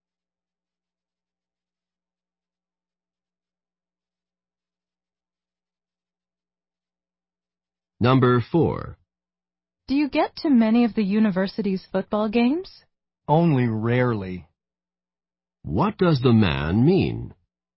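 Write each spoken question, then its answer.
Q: What does the man mean?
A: He seldom goes to the games.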